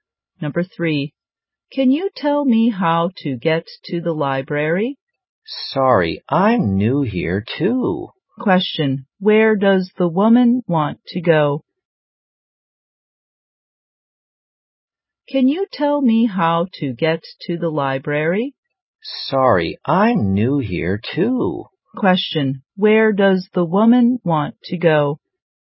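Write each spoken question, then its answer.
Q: where does the woman want to go?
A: The library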